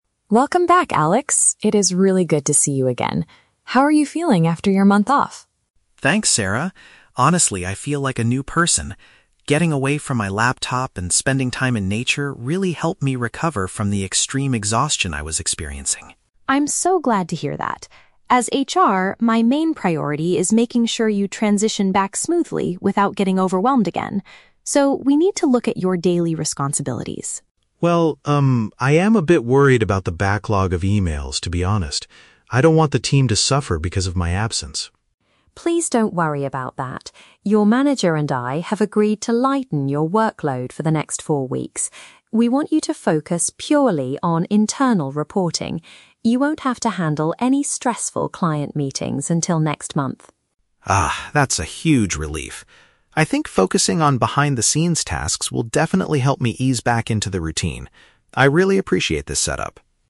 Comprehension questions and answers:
Listen to the conversation between an HR specialist (Sarah) and an employee (Alex), and choose the correct answer (A, B, or C).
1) What was the main reason for Alex's recent absence from work?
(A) He wanted to spend a month exploring nature.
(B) He needed time to recover from severe tiredness.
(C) He had to travel to take care of his sick relatives.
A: He needed time to recover from severe tiredness.

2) What is the HR specialist's primary goal for Alex?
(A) To help him return to his duties without too much pressure.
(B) To ask him to clear his huge backlog of emails immediately.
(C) To offer him a promotion to a new department.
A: To help him return to his duties without too much pressure.

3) What will Alex's work arrangement be for the next four weeks?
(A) He will be allowed to work from home to save energy.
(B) He will be responsible for leading important client meetings.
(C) He will exclusively focus on background administrative tasks.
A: He will exclusively focus on background administrative tasks.

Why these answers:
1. Alex mentions that his time off helped him "recover from the extreme exhaustion." The phrase "severe tiredness" is a paraphrase of extreme exhaustion/burnout.
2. Sarah says her priority is making sure he can "transition back smoothly without getting overwhelmed again" (without too much pressure).
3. Sarah states that he will "focus purely on internal reporting," and Alex calls them "behind-the-scenes tasks." "Background administrative tasks" is a paraphrase of these phrases.

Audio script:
Sarah: Welcome back, Alex. It is really good to see you again. How are you feeling after your month off?
Alex: Thanks, Sarah. Honestly, I feel like a new person. Getting away from my laptop and spending time in nature really helped me recover from the extreme exhaustion I was experiencing.
Sarah: I'm so glad to hear that. As HR, my main priority is making sure you transition back smoothly without getting overwhelmed again. So, we need to look at your daily responsibilities.
Alex: Well, um, I am a bit worried about the backlog of emails, to be honest. I don't want the team to suffer because of my absence.
Sarah: Please don't worry about that. Your manager and I have agreed to lighten your workload for the next four weeks. We want you to focus purely on internal reporting. You won't have to handle any stressful client meetings until next month.
Alex: Ah, that's a huge relief. I think focusing on behind-the-scenes tasks will definitely help me ease back into the routine. I really appreciate this setup.

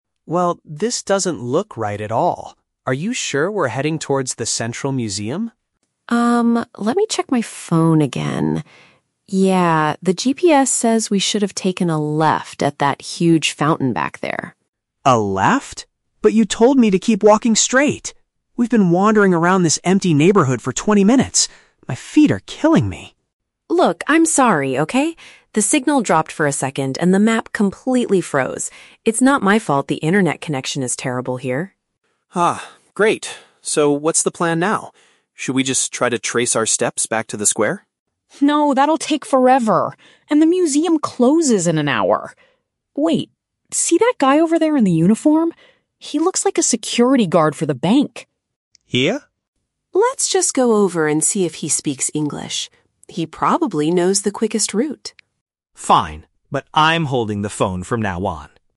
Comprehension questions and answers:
Listen to the conversation between two friends and choose the correct answer (A, B, or C) for each question.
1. What caused the two friends to get lost?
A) They decided to explore an empty neighborhood.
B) The woman's navigation application stopped working properly.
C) The man gave incorrect instructions at the fountain.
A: The woman's navigation application stopped working properly.

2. How does the man feel about their current situation?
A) He is physically exhausted from walking too much.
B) He is angry because the museum is already closed.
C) He is nervous about talking to strangers in a foreign country.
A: He is physically exhausted from walking too much.

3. What do they finally decide to do to solve the problem?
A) Return to the area where they started.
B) Try to find a place with a better internet connection.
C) Get directions from a local employee.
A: Get directions from a local employee.

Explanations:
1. The Key: The woman says, "The signal dropped for a second and the map completely froze." Option B correctly paraphrases this issue. The Trap (C): The man didn't give the wrong instructions; the woman was the one holding the phone and reading the map. Plausible (A): They are in an empty neighborhood, but this is the result of getting lost, not the cause.
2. The Key: The man complains, "We've been wandering around... for twenty minutes. My feet are killing me." Option A paraphrases his physical discomfort. The Trap (B): The museum is mentioned, but it is not closed yet. The woman says it "closes in an hour." Plausible (C): It is common to be nervous about talking to strangers abroad, but the man never mentions feeling this way (he simply agrees by saying "Fine").
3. The Key: The woman suggests speaking to the "security guard for the bank" to see if he knows the route. Option C paraphrases this as getting assistance from a "local employee." The Trap (A): Returning to their starting point ("trace our steps back to the square") is suggested by the man, but the woman immediately rejects it ("No, that'll take forever"). Plausible (B): They lost their internet connection, so finding Wi-Fi seems like a logical step, but neither person suggests doing this in the conversation.

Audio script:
Mark: Well, this doesn't look right at all. Are you sure we're heading towards the Central Museum?
Sarah: Um, let me check my phone again. Yeah... the GPS says we should have taken a left at that huge fountain back there.
Mark: A left? But you told me to keep walking straight! We've been wandering around this empty neighborhood for twenty minutes. My feet are killing me.
Sarah: Look, I'm sorry, okay? The signal dropped for a second and the map completely froze. It's not my fault the internet connection is terrible here.
Mark: Ah, great. So what's the plan now? Should we just try to trace our steps back to the square?
Sarah: No, that'll take forever, and the museum closes in an hour. Wait... see that guy over there in the uniform? He looks like a security guard for the bank.
Mark: Yeah?
Sarah: Let's just go over and see if he speaks English. He probably knows the quickest route.

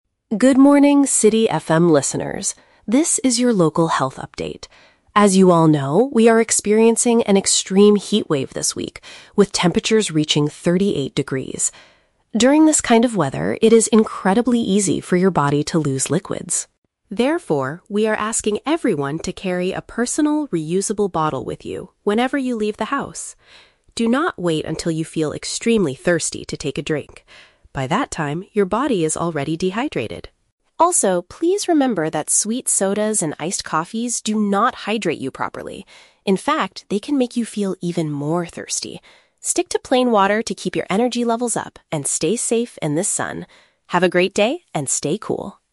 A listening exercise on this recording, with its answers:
Listen to a public service announcement on the radio. For each question, choose the correct answer (A, B, or C).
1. What is the main reason for this radio announcement?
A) To warn listeners about an upcoming summer storm.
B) To advise citizens on how to maintain fluid levels in hot weather.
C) To advertise a new brand of reusable sports bottles.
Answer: To advise citizens on how to maintain fluid levels in hot weather.

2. According to the speaker, what is a mistake people make when drinking water?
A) Waiting to drink until they feel a strong need for liquids.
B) Drinking a large amount of water before leaving the house.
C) Mixing their plain water with sweet fruit juices.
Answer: Waiting to drink until they feel a strong need for liquids.

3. Why does the announcer suggest avoiding sodas and coffees?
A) Because they contain too much sugar for a balanced diet.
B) Because they do not effectively provide the body with needed moisture.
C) Because they are currently too expensive to buy in the city.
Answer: Because they do not effectively provide the body with needed moisture.

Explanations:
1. The announcer wants to remind people not to "lose liquids" during the "extreme heatwave" (maintain fluid levels in hot weather). Option (A) is a trap; the weather is mentioned, but it's a heatwave, not a storm. Option (C) is a trap; the speaker tells people to "carry a personal, reusable bottle," but is not advertising or selling them.
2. The speaker warns: "Do not wait until you feel extremely thirsty to take a drink" (waiting until they feel a strong need). Option (B) is a trap; the speaker says to carry a bottle "whenever you leave the house," not that drinking before leaving is a mistake. Option (C) is not mentioned.
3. The announcer explicitly states that sodas and coffees "do not hydrate you properly" and can "make you feel even more thirsty" (they do not effectively provide moisture). Option (A) is a trap; the word "sweet" is used, but the announcer's reason is about hydration, not general diet or weight. Option (C) is never mentioned.

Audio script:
Announcer: Good morning, City FM listeners. This is your local health update. As you all know, we are experiencing an extreme heatwave this week, with temperatures reaching thirty-eight degrees. During this kind of weather, it is incredibly easy for your body to lose liquids.
Therefore, we are asking everyone to carry a personal, reusable bottle with you whenever you leave the house. Do not wait until you feel extremely thirsty to take a drink. By that time, your body is already dehydrated.
Also, please remember that sweet sodas and iced coffees do not hydrate you properly. In fact, they can make you feel even more thirsty. Stick to plain water to keep your energy levels up and stay safe in this sun. Have a great day, and stay cool!

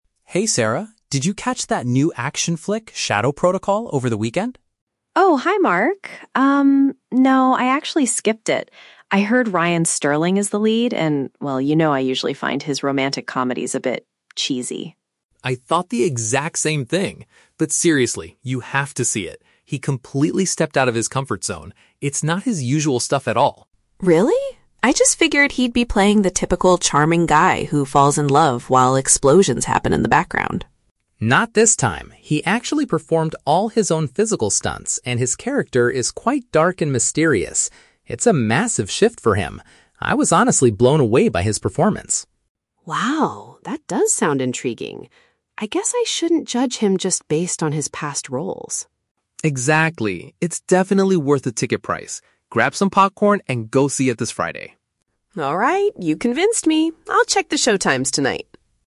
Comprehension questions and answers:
Listen to the conversation between two friends and choose the correct answer (A, B, or C) for each question.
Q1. Why didn't Sarah watch the movie initially?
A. She dislikes the actor's usual movie genre.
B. She is not a fan of action movies in general.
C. She heard bad reviews about the film.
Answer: She dislikes the actor's usual movie genre.

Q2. What impressed Mark about Ryan Sterling's performance?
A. He played a very romantic and charming character.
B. He did his own dangerous action scenes.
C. He co-directed the movie himself.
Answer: He did his own dangerous action scenes.

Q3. What is the final outcome of the conversation?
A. Mark promises to buy a ticket for Sarah.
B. Sarah agrees to give the movie a try.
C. They decide to watch a comedy on Friday.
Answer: Sarah agrees to give the movie a try.

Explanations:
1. Sarah says she finds his "romantic comedies a bit cheesy" (which matches "dislikes the actor's usual movie genre").
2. Mark says the actor "performed all his own physical stunts" (which is a paraphrase for "did his own dangerous action scenes").
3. At the end, Sarah says "Alright, you convinced me. I'll check the showtimes tonight," which means she agrees to try watching the movie.

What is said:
Mark: Hey Sarah, did you catch that new action flick, "Shadow Protocol", over the weekend?
Sarah: Oh, hi Mark. Um, no, I actually skipped it. I heard Ryan Sterling is the lead, and well, you know I usually find his romantic comedies a bit... cheesy.
Mark: I thought the exact same thing! But seriously, you have to see it. He completely stepped out of his comfort zone. It's not his usual stuff at all.
Sarah: Really? I just figured he'd be playing the typical charming guy who falls in love while explosions happen in the background.
Mark: Not this time. He actually performed all his own physical stunts, and his character is quite dark and mysterious. It's a massive shift for him. I was honestly blown away by his performance.
Sarah: Wow, that does sound intriguing. I guess I shouldn't judge him just based on his past roles.
Mark: Exactly. It's definitely worth the ticket price. Grab some popcorn and go see it this Friday!
Sarah: Alright, you convinced me. I'll check the showtimes tonight.

